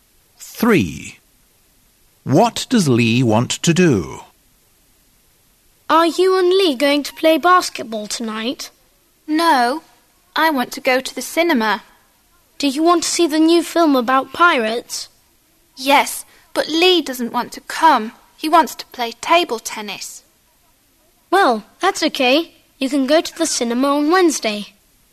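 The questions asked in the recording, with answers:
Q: What does Lee want to do?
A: play table tennis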